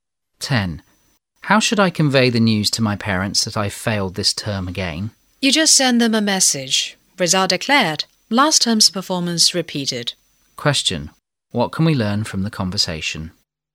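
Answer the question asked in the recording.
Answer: The speaker failed his exams again this term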